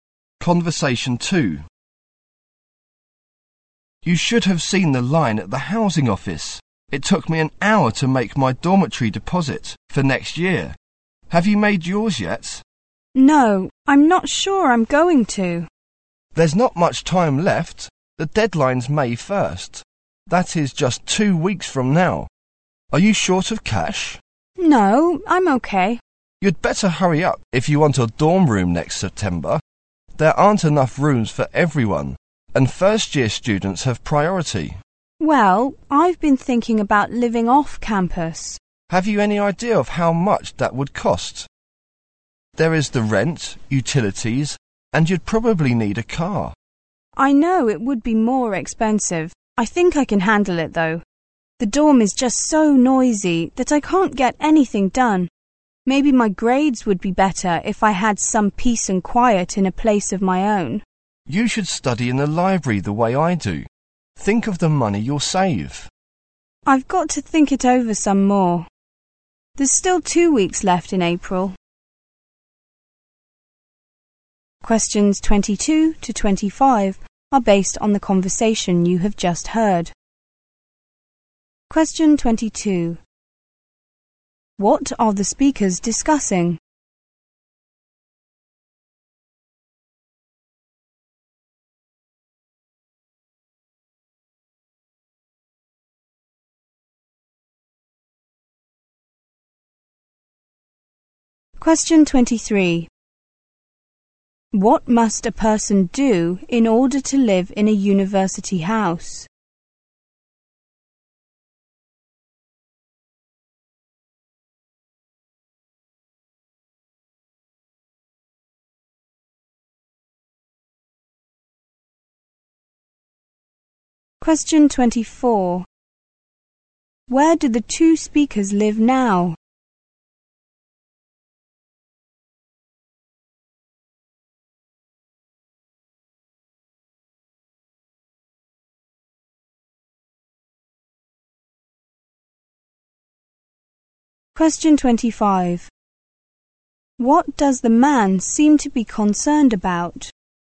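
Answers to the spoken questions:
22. Whether to live in a dorm or off campus next year
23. Make a deposit before May 1st
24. In a dormitory on campus
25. His grades / needing quiet to study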